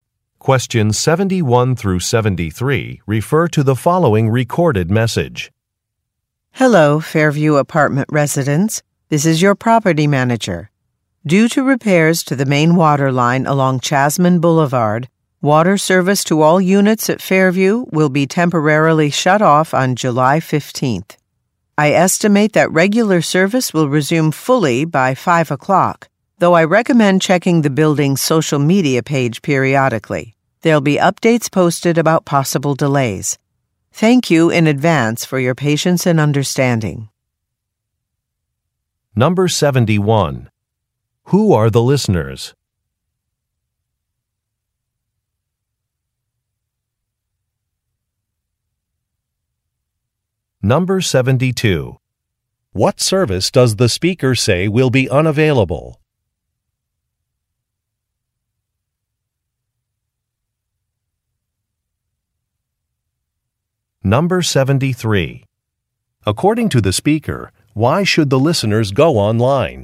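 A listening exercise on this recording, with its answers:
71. Who are the listeners?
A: Residents in an apartment building

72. What service does the speaker say will be unavailable?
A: Water

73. According to the speaker, why should the listeners go online?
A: To check for status updates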